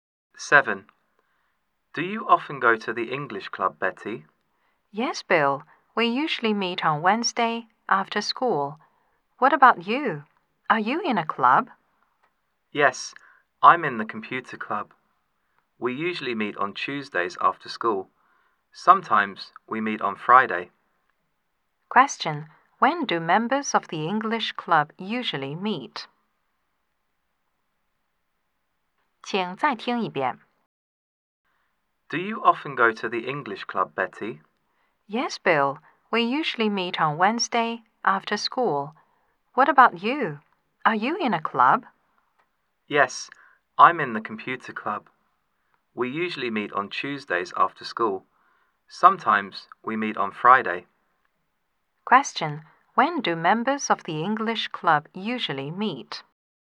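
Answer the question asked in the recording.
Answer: On Wednesdays after school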